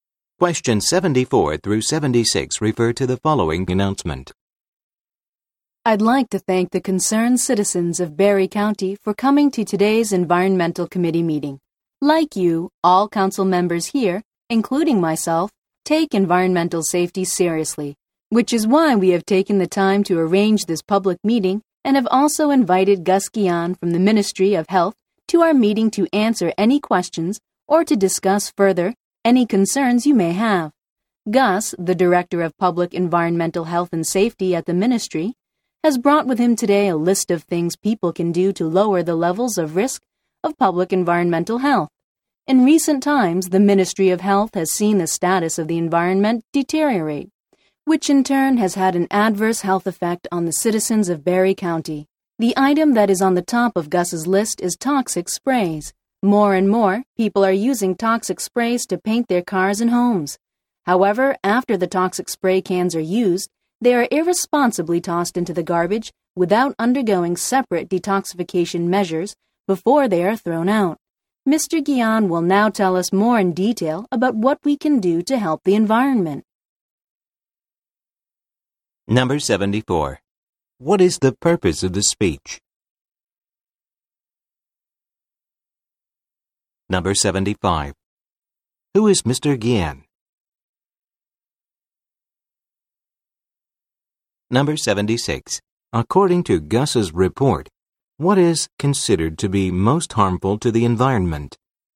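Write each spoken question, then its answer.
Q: Who is Mr. Gian?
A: Director of Public Environmental Health and Safety at the Ministry of Health

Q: According to Gus's report, what is considered to be most harmful to the environment?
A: Toxic sprays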